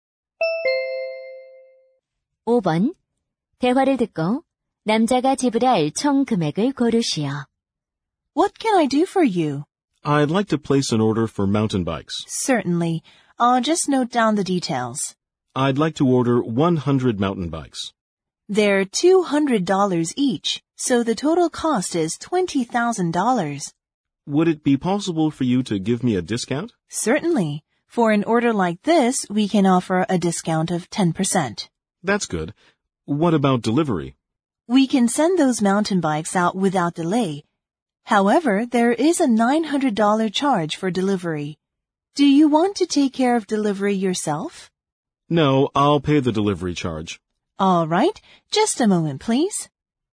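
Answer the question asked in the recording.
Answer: 18,900달러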